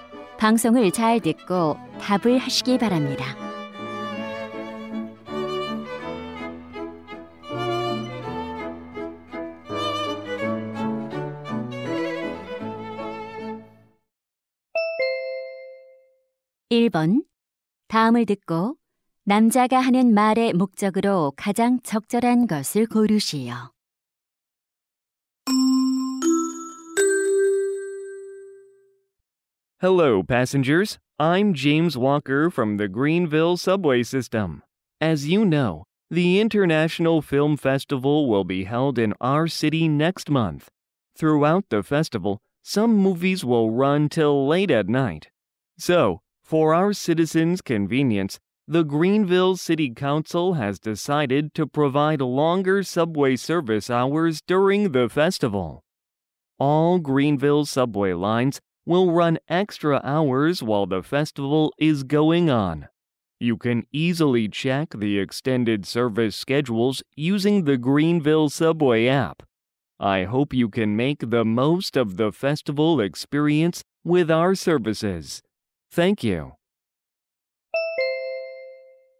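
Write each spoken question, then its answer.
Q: 다음을 듣고 남자가 하는 말의 목적으로 가장 적절한 것을 고르시오.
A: 영화제 기간 동안 지하철 운행 시간 연장을 안내하려고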